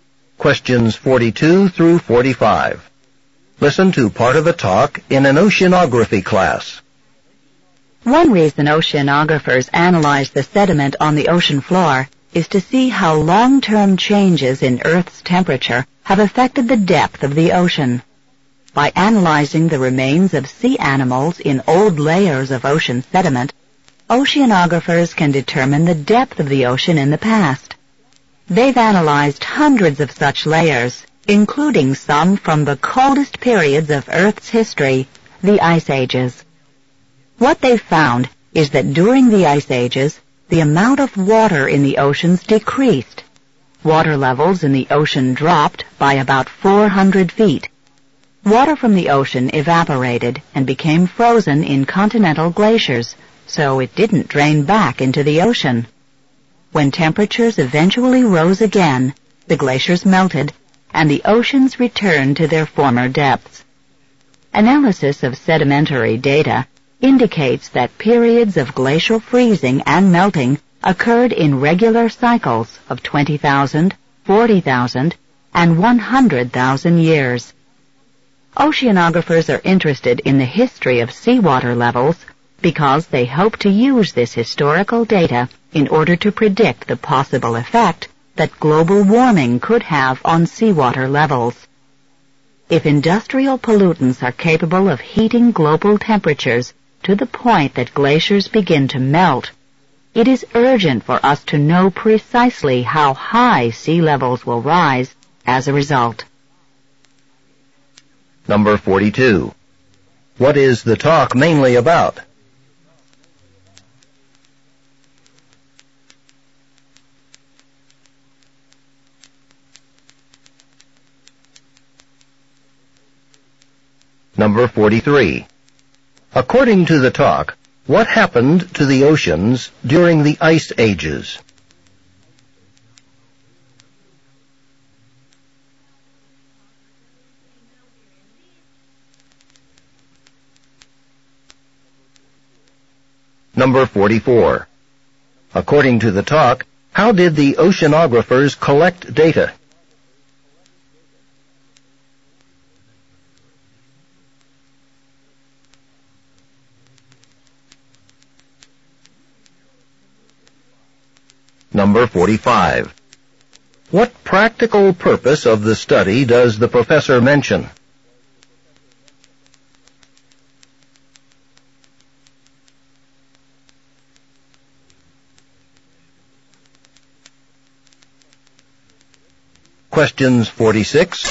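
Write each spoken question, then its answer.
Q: What is the talk mainly about?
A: How changes in Earth's temperature have affected ocean depth, as shown by ocean-floor sediment

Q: According to the talk, what happened to the oceans during the Ice Ages?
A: The amount of water decreased and sea levels dropped by about 400 feet

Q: According to the talk, how did the oceanographers collect data?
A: By analyzing the remains of sea animals in old layers of ocean sediment

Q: What practical purpose of the study does the professor mention?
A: To predict how global warming could affect sea levels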